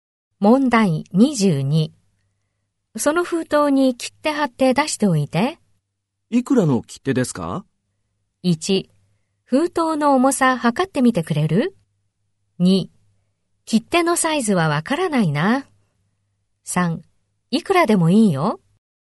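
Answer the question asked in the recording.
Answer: 1: 封筒の重さ測ってみてくれる?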